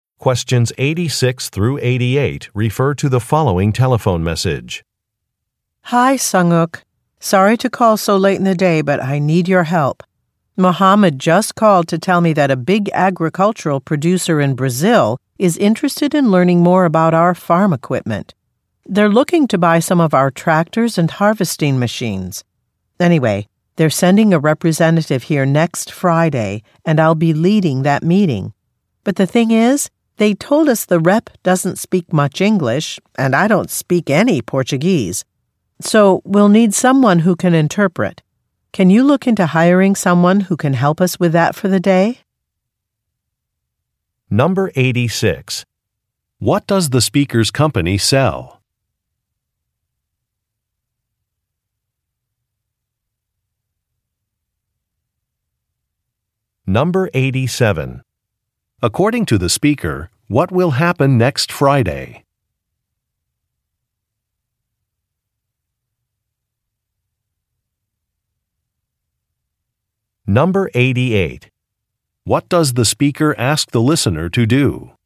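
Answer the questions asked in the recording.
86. Farm equipment
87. A representative from a Brazilian agricultural producer will visit for a meeting
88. Hire an interpreter for the day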